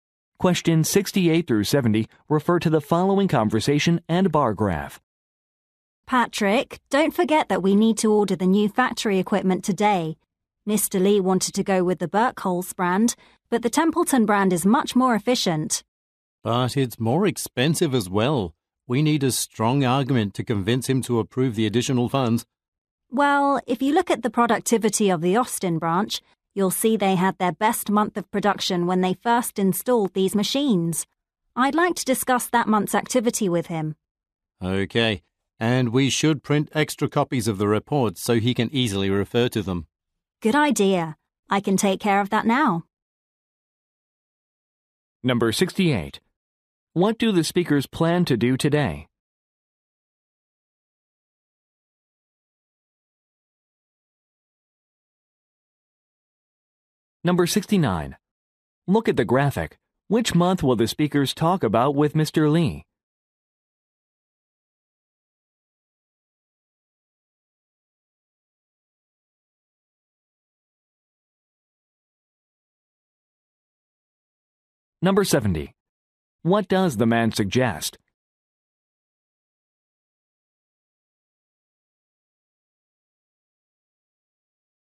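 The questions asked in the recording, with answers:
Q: What do the speakers plan to do today?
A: Order new factory equipment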